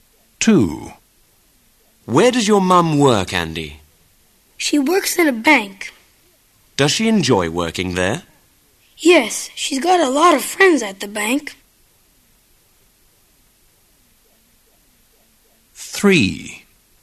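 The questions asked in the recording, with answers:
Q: Where does your mum work, Andy?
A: In a bank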